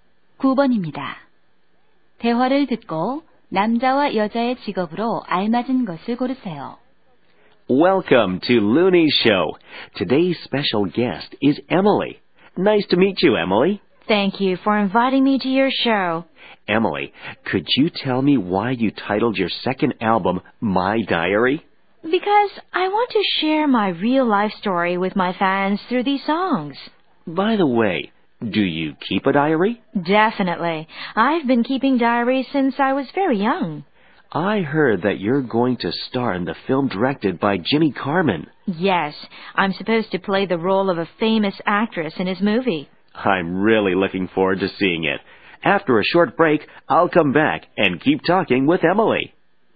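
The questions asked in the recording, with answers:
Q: 대화를 듣고 남자와 여자의 직업으로 알맞은 것을 고르세요.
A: 남자: 토크쇼 진행자, 여자: 가수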